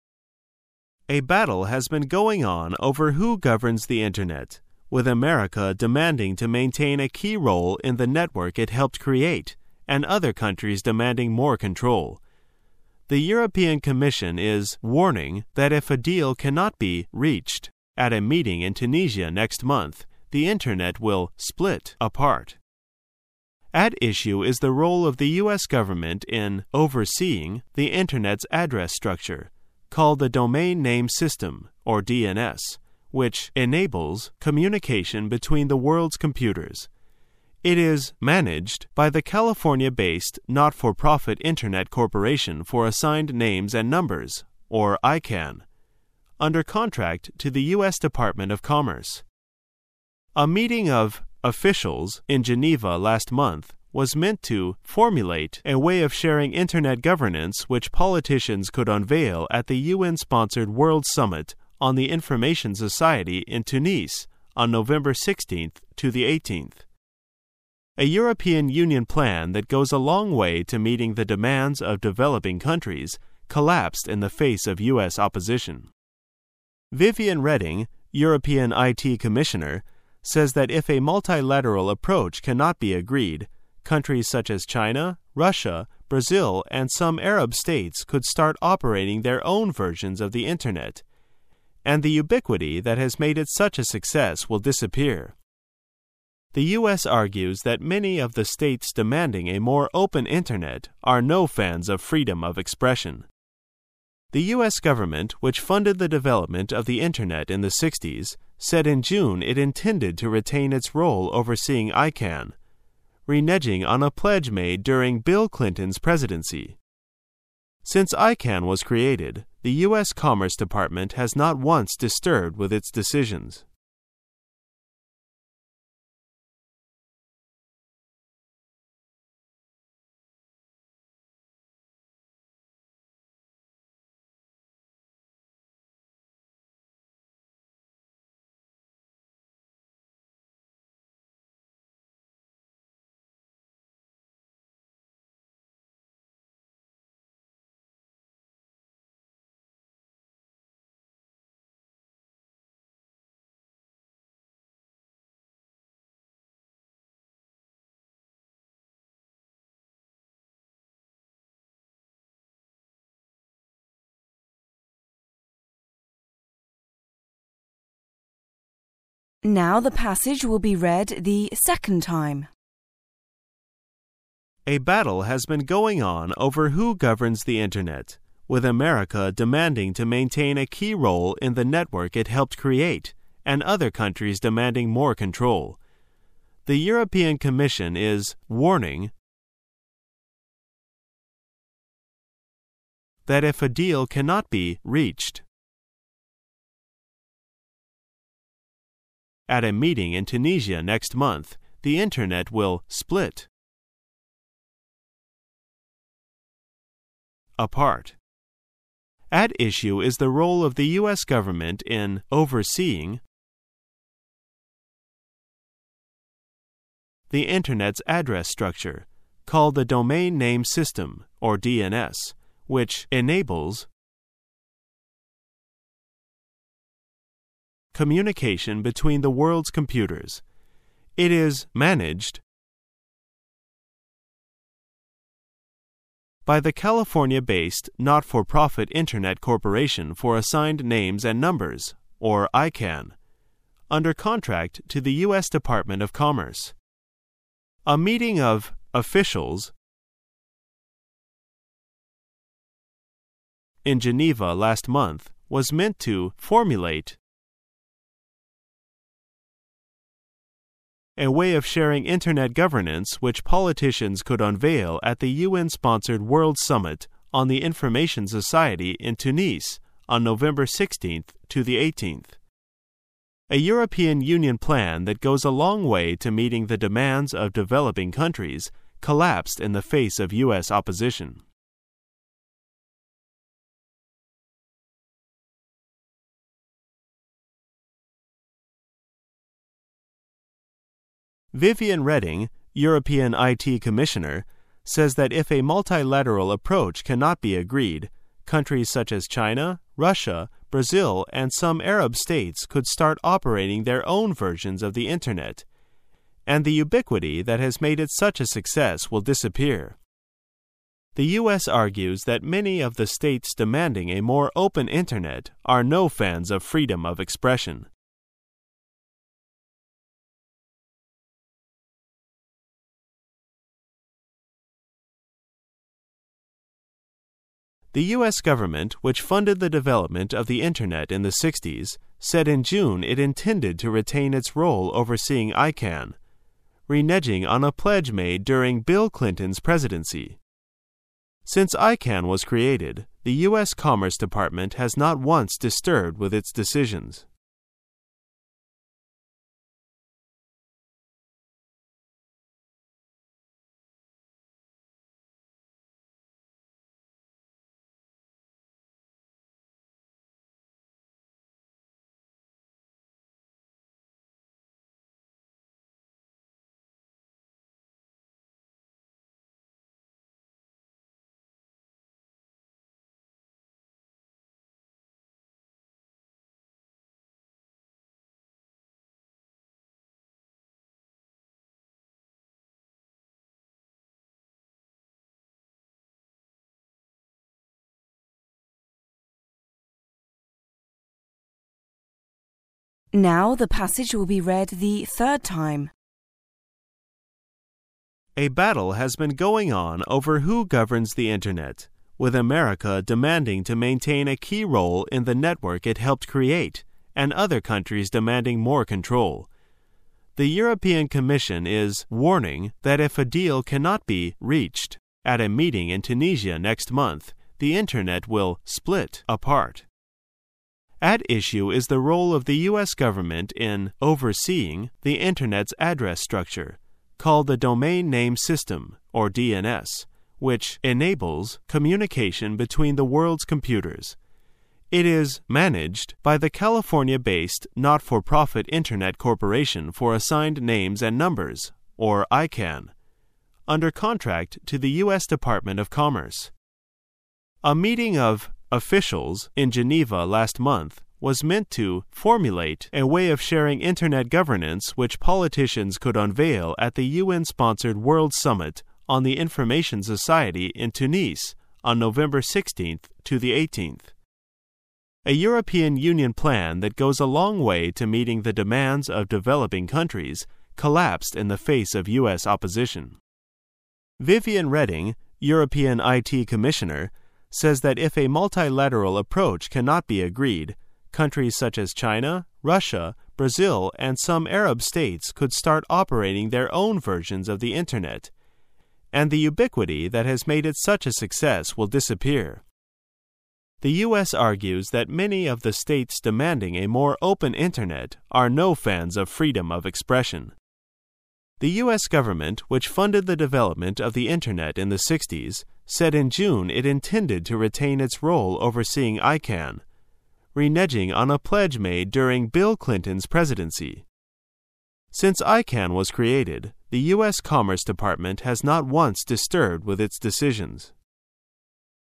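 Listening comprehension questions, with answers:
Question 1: The European commission is 1 that if a deal cannot be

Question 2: if a deal cannot be 2 at a meeting in Tunisia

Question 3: the internet will 3 apart.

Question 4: At issue is the role of the US government in 4 the internet's address structure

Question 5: which 5 communication between the world's computers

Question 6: It is 6 by the California based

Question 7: A meeting of 7 in Geneva last month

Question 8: was meant to 8 a way of sharing internet governance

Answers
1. warning
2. reached
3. split
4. overseeing
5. enables
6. managed
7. officials
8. formulate

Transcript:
[解析] 36-46 A battle has been going on over who governs the internet, with America demanding to maintain a key role in the network it helped create and other countries demanding more control. The European commission is (36) warning that if a deal cannot be (37)reached at a meeting in Tunisia next month the internet will(38)split apart. 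At issue is the role of the US government in(39)overseeing the internet's address structure, called the domain name system (DNS), which (40) enables communication between the world's computers. It is(41)managed by the California-based, not-for profit Internet Corporation for Assigned Names and Numbers (Icann) under contract to the US department of commerce. A meeting of (42)officials in Geneva last month was meant to (43)formulate a way of sharing internet governance which politicians could unveil at the UN sponsored World Summit on the Information Society in Tunis on November 16-18. (44)A European Union plan that goes a long way to meeting the demands of developing countries collapsed in the face of US opposition. Viviane Reding, European IT commissioner, says that if a multilateral approach can not be agreed, countries such as China, Russia, Brazil and some Arab states could start operating their own versions of the internet and the ubiquity that has made it such a success will disappear. 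(45)The US argues that many of the states demanding a more open internet are no fans of freedom of expression. The US government, which funded the development of the internet in the 60s, said in June it intended to retain its role overseeing Icann, reneging on a pledge made during Bill Clinton's presidency. (46)Since lcann was created, the US commerce department has not once disturbed with its decisions.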